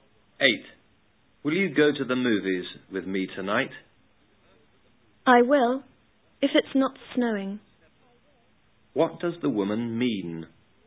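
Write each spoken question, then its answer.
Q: What does the woman mean?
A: She will go to the movies if it doesn't snow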